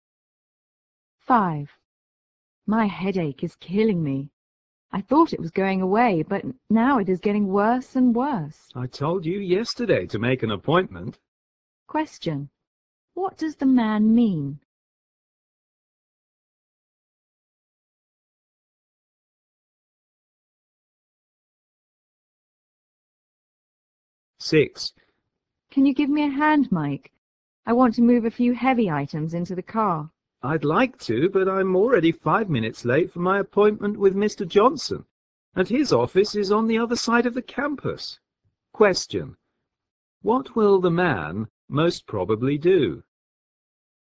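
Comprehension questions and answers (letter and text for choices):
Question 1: What does the man mean?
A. The woman should confirm her appointment with the doctor.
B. The woman should have seen the doctor earlier.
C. The woman's headache will go away by itself.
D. The woman has been complaining too much.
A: B. The woman should have seen the doctor earlier.

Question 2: What would the man most probably do?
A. Put off his appointment with Mr. Johnson.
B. Help move things to Mr. Johnson's office.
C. Help the woman move the items.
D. Hurry to Mr. Johnson's office.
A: D. Hurry to Mr. Johnson's office.

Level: 大学英语四级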